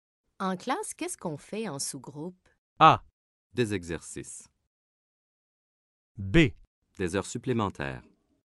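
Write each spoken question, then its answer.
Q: En classe, qu'est-ce qu'on fait en sous-groupe?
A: A: Des exercices.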